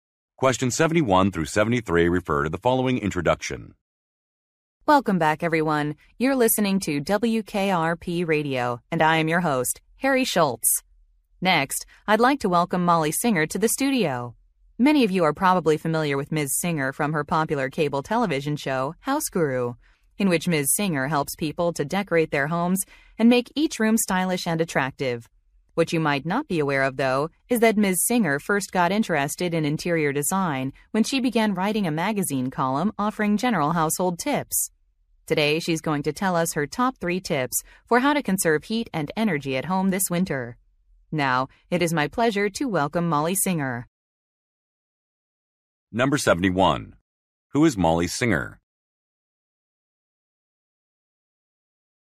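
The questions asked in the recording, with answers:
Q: Who is Molly Singer?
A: A TV show host / interior design expert (House Guru)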